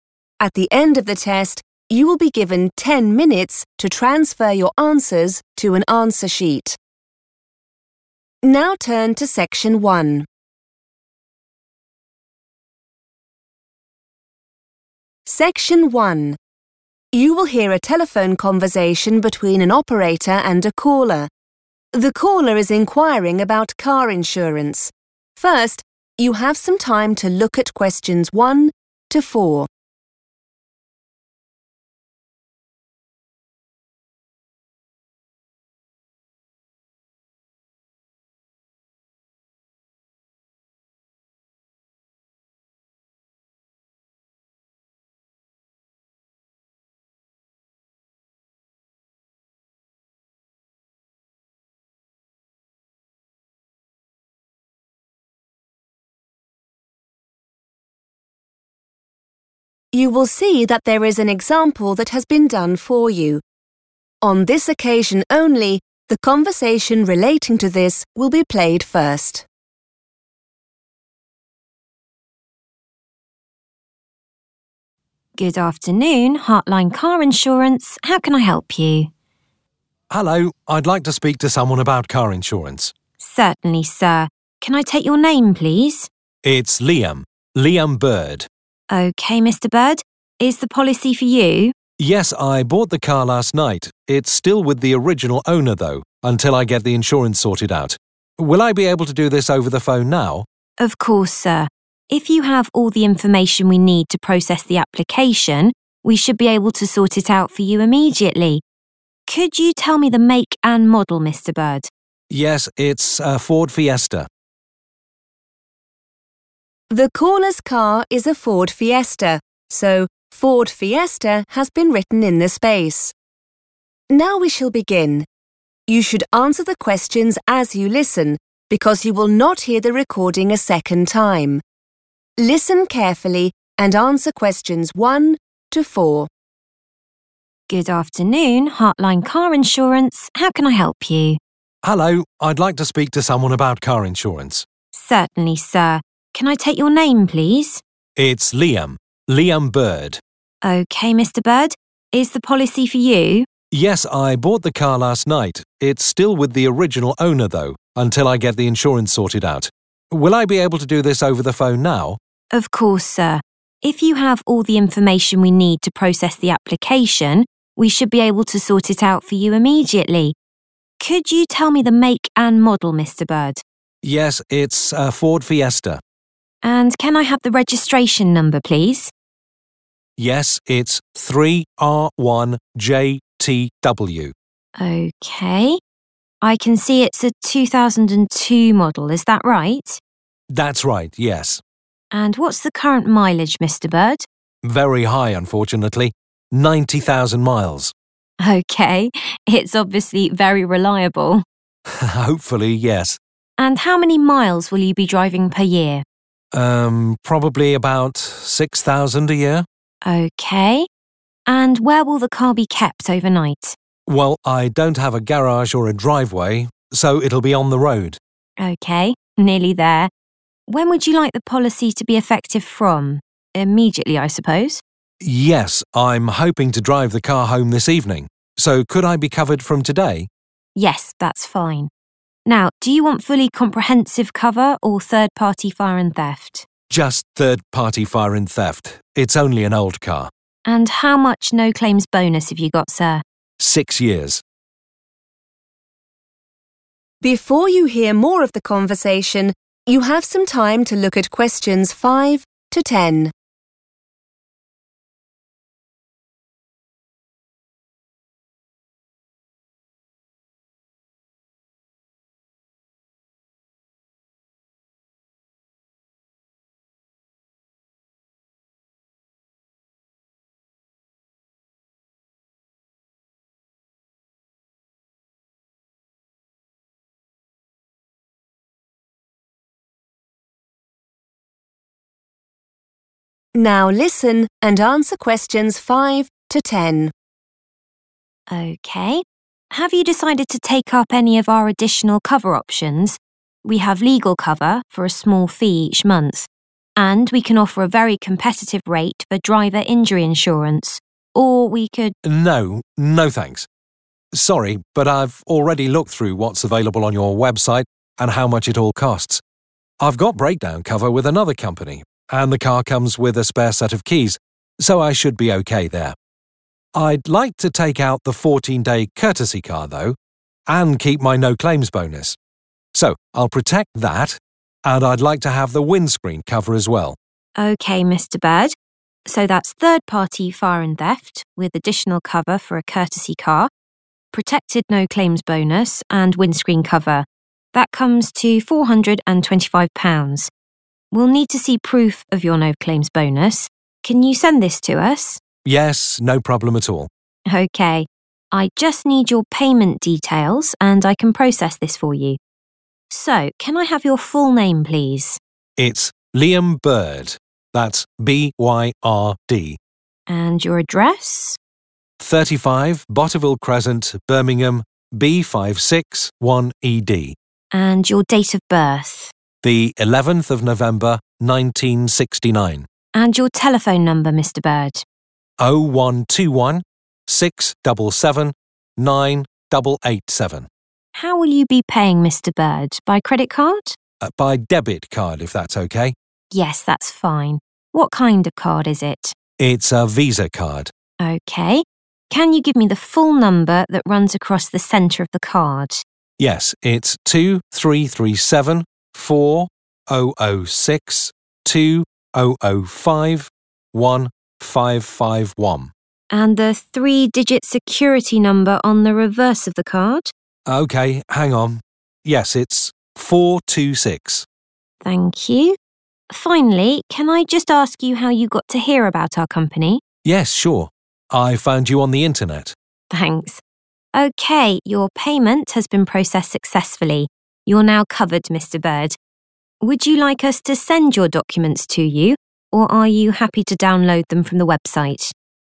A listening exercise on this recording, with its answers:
Complete the form below. Write NO MORE THAN THREE WORDS AND / OR A NUMBER for each answer.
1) 3R1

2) Current mileage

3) Overnight parking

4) Third party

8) Postcode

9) Payment by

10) How did the customer hear about Hartline?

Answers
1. JTW
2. 90,000 / 90000
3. on the road
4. fire and theft
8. B56 1ED
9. debit card / Visa card
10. on the Internet

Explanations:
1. The correct answer is JTW because when the insurance agent asks for the car's registration number (the letters and numbers on the car's license plate), Liam gives the full code as 3R1 JTW. Since the form already shows 3R1, the missing part to complete the number is JTW.
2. The correct answer is 90,000 because Debbie asks for the 'current mileage' and Liam answers with the number '90,000'. In car insurance, the 'current mileage' is the total distance recorded on the car's odometer at the time of the application.
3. The correct answer is "on the road" because the insurance agent asks Liam where the car will stay at night. Liam explains that he does not have a private garage or a driveway, so he must park it on the street.
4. The correct answer is "fire and theft" because Liam explicitly selects this level of insurance coverage when given a choice between "fully comprehensive" and "third party fire and theft." He chooses this option because he considers his car to be old and does not feel he needs the most expensive type of insurance.
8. The correct answer is B56 1ED because, in the conversation, the insurance worker named Debbie asks for Liam's address. Liam replies with his full address, including the house number, street name, city, and finally the postcode, which is B56 1ED.
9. The correct answer is found when the insurance worker asks about the payment method. Liam first says he wants to pay using a debit card. When asked for more details, he says it is a Visa card. These details provide the specific payment information needed for the form.
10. The correct answer is 'on the Internet' because at the end of the phone call, the employee (Debbie) asks Liam how he learned about their company. Liam answers that he discovered them while using the web. Paying attention to the phrase 'hear about' helps identify that the agent is asking for the source of information, while Liam's phrase 'found you' indicates how he located them.